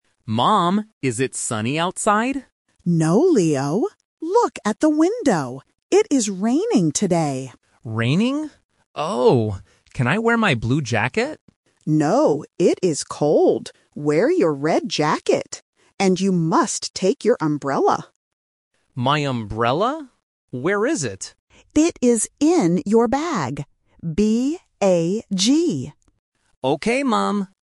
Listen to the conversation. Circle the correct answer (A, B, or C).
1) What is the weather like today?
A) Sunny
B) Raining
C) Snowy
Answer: B

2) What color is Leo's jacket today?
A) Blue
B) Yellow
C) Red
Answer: C

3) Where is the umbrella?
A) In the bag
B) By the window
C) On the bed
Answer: A

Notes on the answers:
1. The Key: The mother says clearly, "It is raining today." The Trap: Option (A) "Sunny" is mentioned by the boy when he asks ("is it sunny outside?"), but the mother says "No". Not Mentioned: Option (C) "Snowy" is not in the audio.
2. The Key: The mother tells him, "Wear your red jacket." The Trap: Option (A) "Blue" is mentioned because the boy wants to wear his blue jacket, but his mother says "No". Not Mentioned: Option (B) "Yellow" is never mentioned.
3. The Key: The mother says, "It is in your bag," and spells the word "B-A-G". The Trap: Option (B) "window" is a word used earlier in the conversation ("Look at the window"), but the umbrella is not there. Not Mentioned: Option (C) "On the bed" is completely new information.

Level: A1

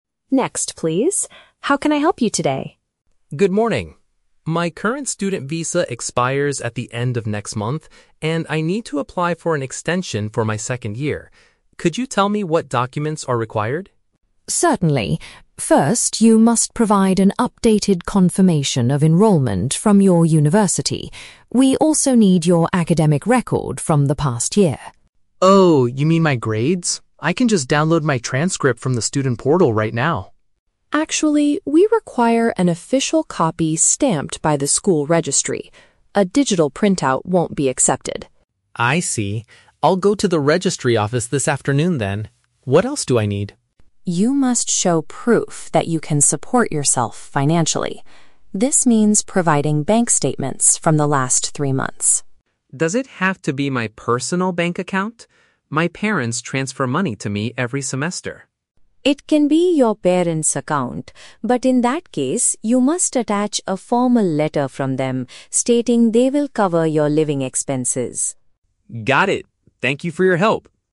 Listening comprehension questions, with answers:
Listen to the conversation between an international student and an immigration officer. Read the questions below and choose the correct answer (A, B, or C) for each.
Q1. What is the main reason for the student's visit?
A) To apply for a brand new visa for his very first year.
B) To submit a request to stay for another academic year.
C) To report his lost passport and immigration documents.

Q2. What problem does the officer point out regarding the student's academic record?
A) It must be a certified physical document from the university.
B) It shows that his grades are too low to continue studying.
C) It cannot be accessed through the school's online system.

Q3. What is required if the student uses his parents' financial records?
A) A record showing all money transfers from the last three years.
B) A written statement confirming they will pay for his daily needs.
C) A face-to-face meeting between his parents and the immigration office.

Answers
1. B
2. A
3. B

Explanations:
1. The student states he needs to "apply for an extension for my second year." (Paraphrased: apply for an extension = submit a request to stay; second year = another academic year). The Trap: Option (A) is incorrect because he is applying for his second year, not his "very first year" (brand new visa). Not mentioned: Option (C) is a plausible reason to visit immigration, but losing a passport is never mentioned.

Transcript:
Officer: Next, please. How can I help you today?
Student: Good morning. My current student visa expires at the end of next month, and I need to apply for an extension for my second year. Could you tell me what documents are required?
Officer: Certainly. First, you must provide an updated confirmation of enrollment from your university. We also need your academic record from the past year.
Student: Oh, you mean my grades? I can just download my transcript from the student portal right now.
Officer: Actually, we require an official copy stamped by the school registry. A digital printout won't be accepted.
Student: I see. I'll go to the registry office this afternoon then. What else do I need?
Officer: You must show proof that you can support yourself financially. This means providing bank statements from the last three months.
Student: Does it have to be my personal bank account? My parents transfer money to me every semester.
Officer: It can be your parents' account, but in that case, you must attach a formal letter from them stating they will cover your living expenses.
Student: Got it. Thank you for your help.

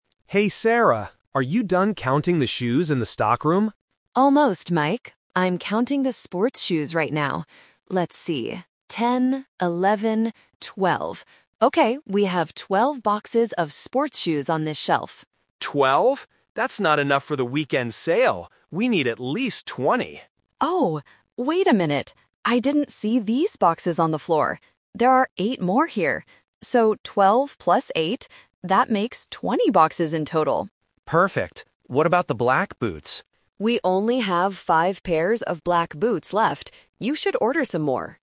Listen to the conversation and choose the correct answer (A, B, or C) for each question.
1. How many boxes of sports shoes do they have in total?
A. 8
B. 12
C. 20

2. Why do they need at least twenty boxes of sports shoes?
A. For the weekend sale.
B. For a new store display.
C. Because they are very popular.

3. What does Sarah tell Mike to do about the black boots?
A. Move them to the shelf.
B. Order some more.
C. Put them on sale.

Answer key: 1C, 2A, 3B

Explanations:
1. This is "The Twist". Sarah first counts 12 boxes on the shelf, but then she finds 8 more on the floor. She calculates: "twelve plus eight... that makes twenty boxes in total." Why the trap is wrong: Option (B) is the trap because it is the first number Sarah says before she finishes counting. Option (A) is the number of extra boxes she finds, not the total amount.
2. Mike says, "That's not enough for the weekend sale." Why the trap is wrong: Options (B) and (C) are plausible reasons for needing more shoes in a store, but the speakers never mention a display or the shoes being popular.
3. At the end of the conversation, Sarah says they only have five pairs of black boots left and tells Mike, "You should order some more." Why the trap is wrong: Option (A) is not mentioned (she found sports shoes on the floor, not boots). Option (C) is a trap using the word "sale" from earlier in the conversation, but it doesn't apply to the boots.

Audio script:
Mike: Hey Sarah, are you done counting the shoes in the stockroom?
Sarah: Almost, Mike. I'm counting the sports shoes right now. Let's see... Okay, we have twelve boxes of sports shoes on this shelf.
Mike: Twelve? That's not enough for the weekend sale. We need at least twenty.
Sarah: Oh, wait a minute! I didn't see these boxes on the floor.

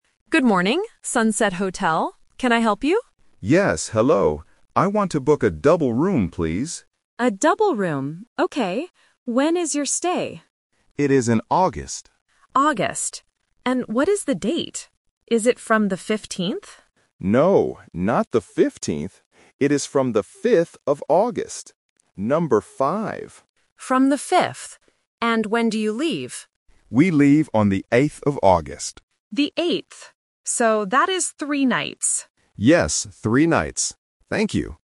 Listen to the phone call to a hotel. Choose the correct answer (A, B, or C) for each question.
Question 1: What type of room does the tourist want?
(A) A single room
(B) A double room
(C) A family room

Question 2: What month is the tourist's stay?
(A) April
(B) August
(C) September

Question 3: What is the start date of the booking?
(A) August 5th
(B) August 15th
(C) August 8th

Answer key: 1B, 2B, 3A

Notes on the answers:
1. The tourist explicitly says, "I want to book a double room, please." Option A (single room) and Option C (family room) are common room types but are not mentioned in the audio.
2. The tourist says the stay is in "August". Option A (April) is a phonetic trap because it also starts with "A". Option C (September) is not mentioned.
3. The receptionist asks if the stay is from "the 15th" (Option B is the trap). The tourist corrects her: "No, not the 15th. It is from the 5th of August," and confirms with "Number five." Option C (August 8th) is the date the tourist leaves, not the start date.

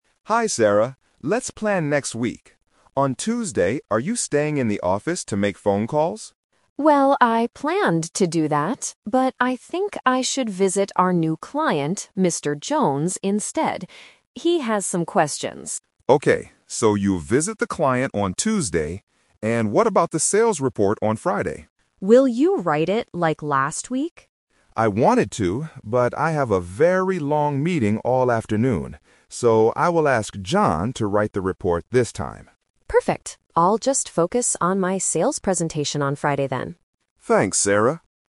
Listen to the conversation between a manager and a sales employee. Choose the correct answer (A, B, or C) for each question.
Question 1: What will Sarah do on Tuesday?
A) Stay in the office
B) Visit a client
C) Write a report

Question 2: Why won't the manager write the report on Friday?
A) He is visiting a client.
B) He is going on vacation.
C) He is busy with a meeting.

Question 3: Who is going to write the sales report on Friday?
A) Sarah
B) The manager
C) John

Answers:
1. B
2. C
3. C

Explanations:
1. The manager mentions staying at the office (The Trap), and Sarah also says she had planned to do that. However, she uses the word "But" to change her mind: going to meet a client (Mr. Jones).
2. The manager explained that the reason for not being able to write the report was "I have a very long meeting all afternoon." Options A and B were not mentioned as reasons for the manager's inability to write the report.
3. Sarah asks if the Manager will write the report (The Trap). The Manager refuses and uses the word "So" to give the final answer: "I will ask John to write it." Sarah will give the presentation, not write the report.

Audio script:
Manager: Hi Sarah, let's plan next week. On Tuesday, are you staying in the office to make phone calls?
Sarah: Well, I planned to do that, but I think I should visit our new client, Mr. Jones, instead. He has some questions.
Manager: Okay, so you'll visit the client on Tuesday. And what about the sales report on Friday?
Sarah: Will you write it like last week?
Manager: I wanted to, but I have a very long meeting all afternoon. So, I will ask John to write the report this time.
Sarah: Perfect. I'll just focus on my sales presentation on Friday then.
Manager: Thanks, Sarah.

